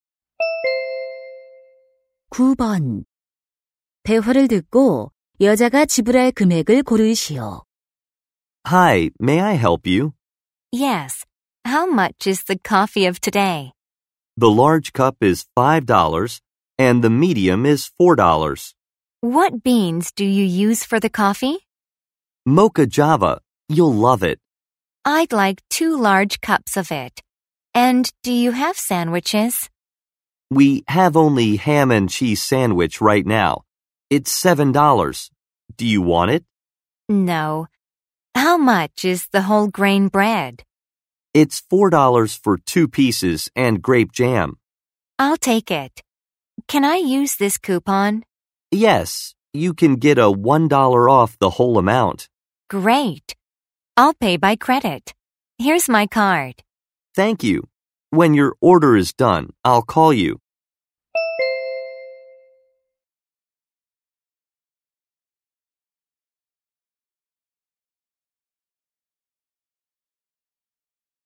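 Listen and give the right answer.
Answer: $13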